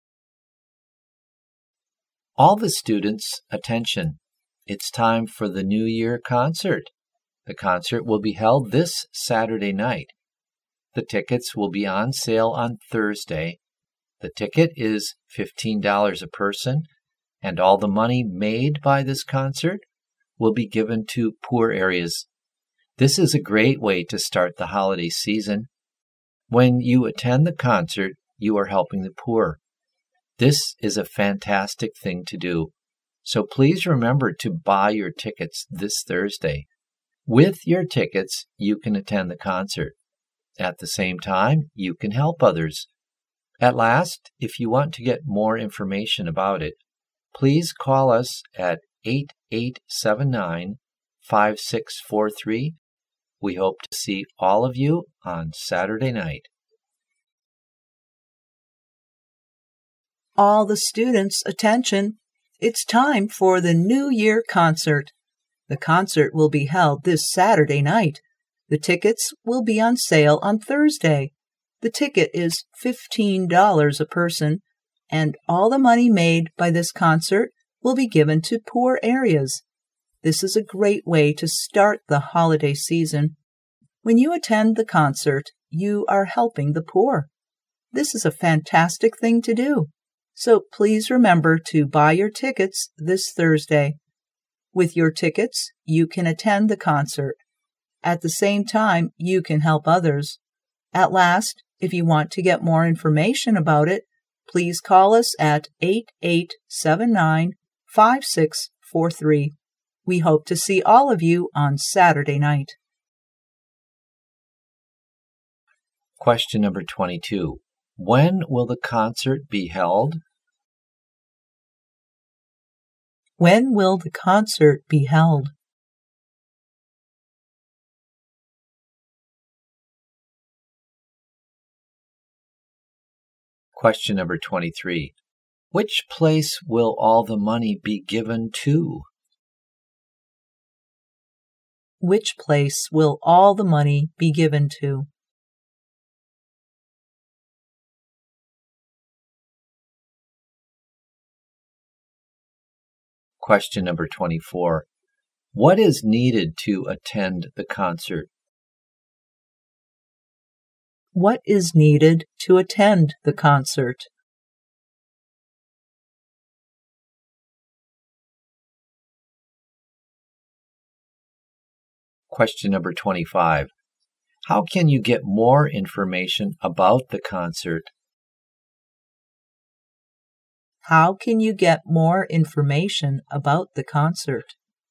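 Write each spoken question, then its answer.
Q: When will the concert be held?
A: This Saturday night

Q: Which place will all the money be given to?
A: Poor areas

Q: What is needed to attend the concert?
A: A ticket

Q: How can you get more information about the concert?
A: By calling 8879-5643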